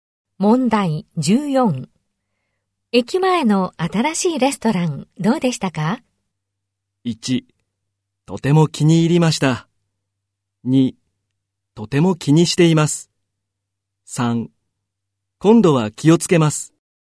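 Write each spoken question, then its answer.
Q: 駅前の新しいレストラン、どうでしたか?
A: 1: とても気に入りました。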